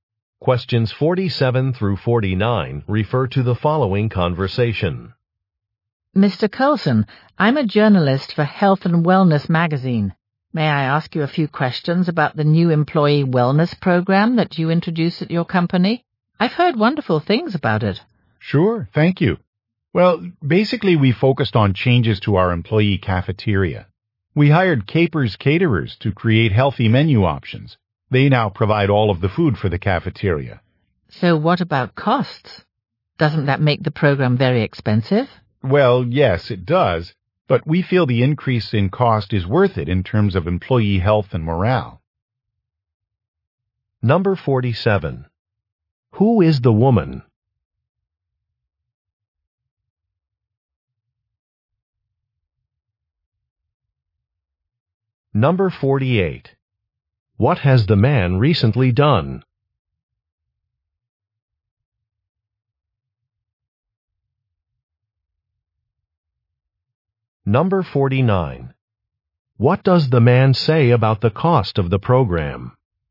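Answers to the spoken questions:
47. A journalist
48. Started an employee wellness program
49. It is expensive but worth it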